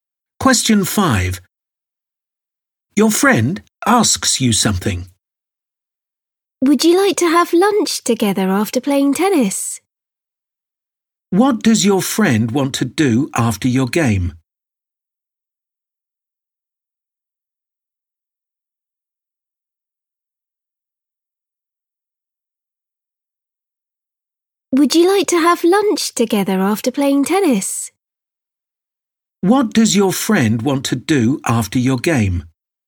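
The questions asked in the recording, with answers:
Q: What does your friend want to do after your game?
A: have lunch together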